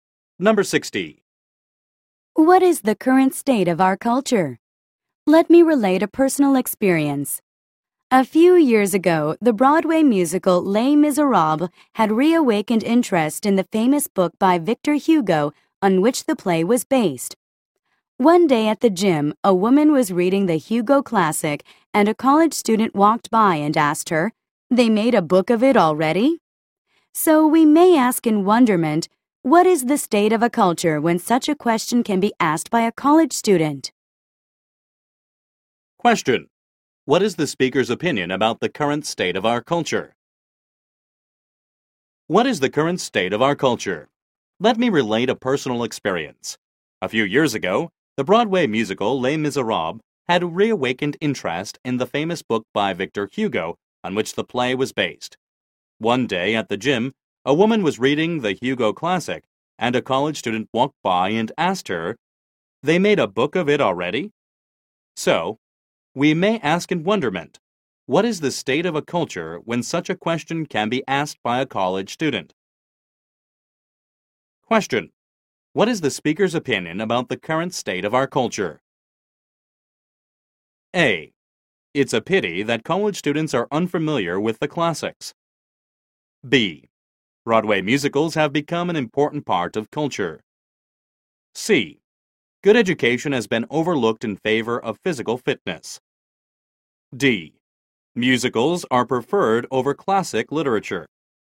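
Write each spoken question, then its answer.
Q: What is the speaker's opinion about the current state of our culture?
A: A: It's a pity that college students are unfamiliar with the classics.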